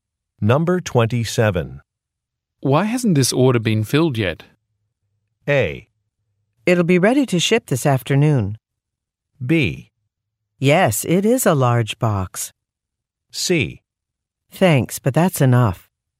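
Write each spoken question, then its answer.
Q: Why hasn't this order been filled yet?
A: A: It'll be ready to ship this afternoon.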